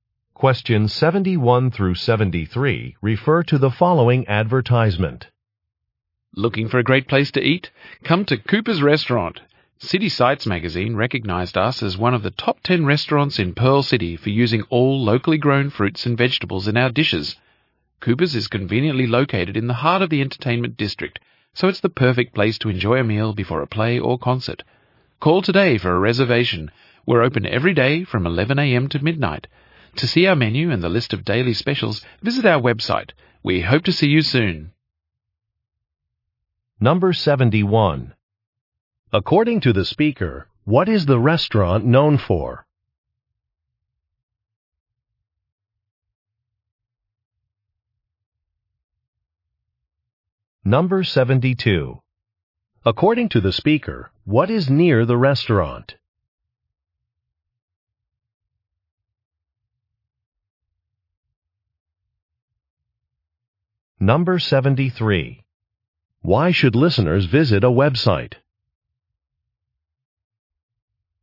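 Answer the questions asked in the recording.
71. Using locally grown fruits and vegetables
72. The entertainment district (theaters, concert venues)
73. To see the menu and daily specials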